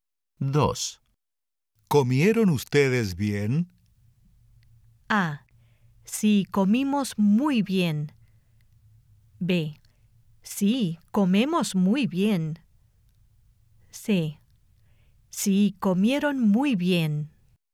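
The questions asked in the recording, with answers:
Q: ¿Comieron ustedes bien?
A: A: Sí, comimos muy bien.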